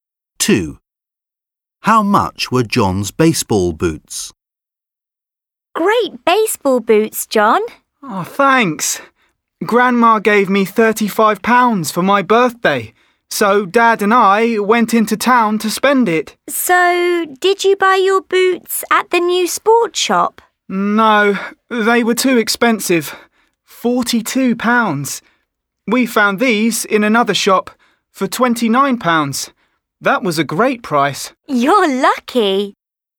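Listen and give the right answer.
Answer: £29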